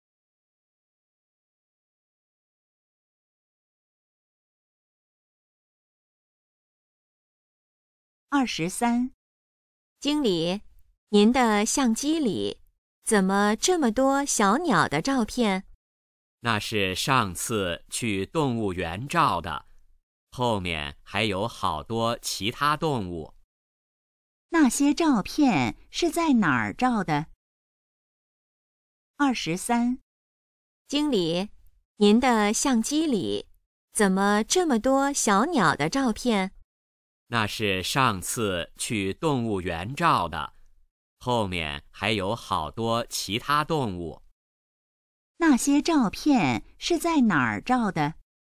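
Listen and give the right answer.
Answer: 动物园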